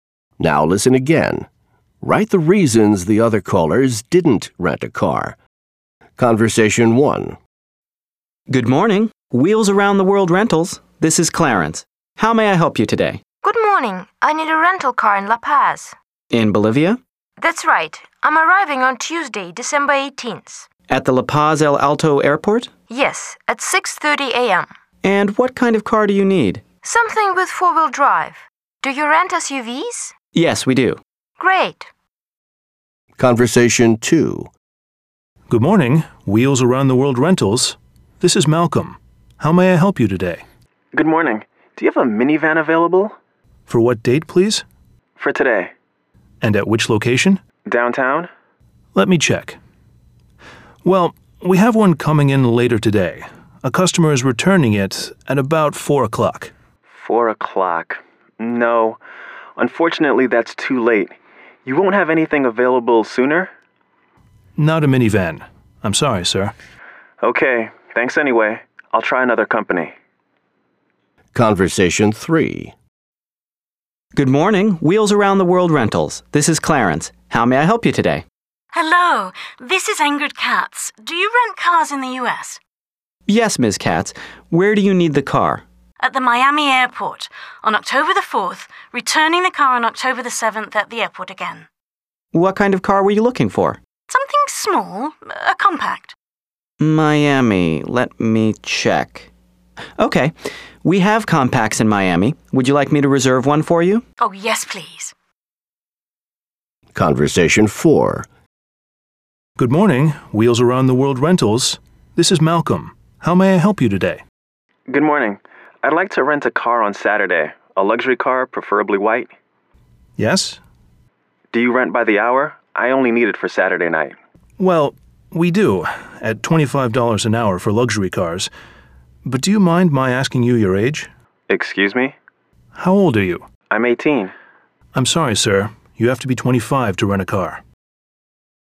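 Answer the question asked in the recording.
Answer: Conversation 2: no minivan available until about 4 o'clock, which was too late; Conversation 4: the caller is 18, and you have to be 25 to rent a car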